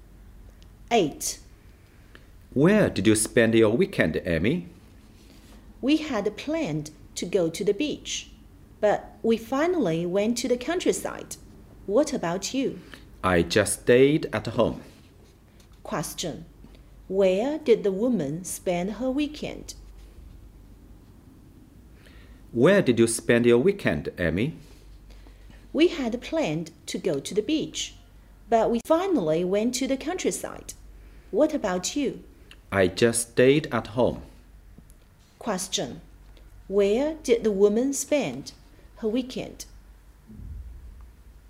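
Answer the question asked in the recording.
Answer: In the countryside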